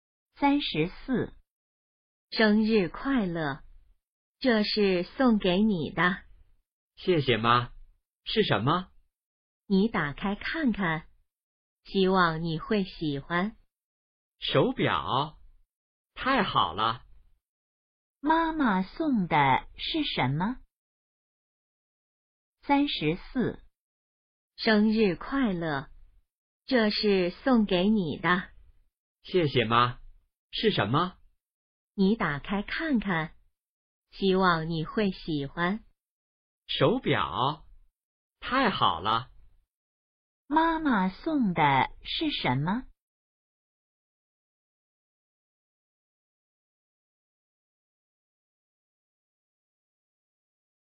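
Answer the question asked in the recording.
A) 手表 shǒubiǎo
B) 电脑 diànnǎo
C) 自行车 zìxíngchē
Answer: A) 手表 shǒubiǎo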